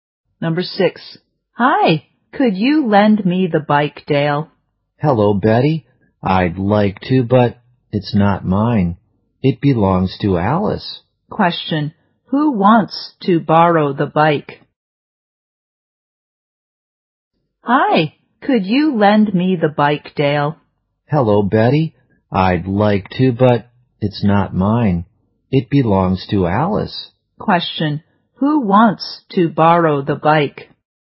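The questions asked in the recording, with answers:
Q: Question. Who wants to borrow the bike?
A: Betty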